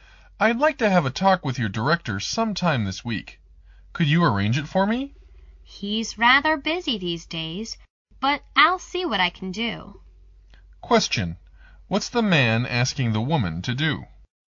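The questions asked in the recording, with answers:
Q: What's the man asking the woman to do?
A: Arrange a meeting with her director this week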